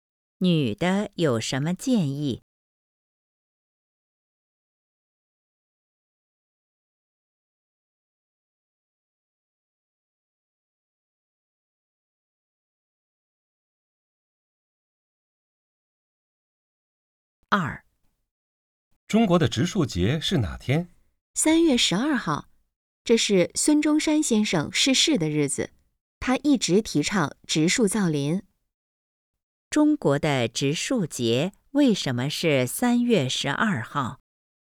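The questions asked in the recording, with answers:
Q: 中国的植树节为什么是3月12号?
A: 这是孙中山先生逝世的日子,他一直提倡植树造林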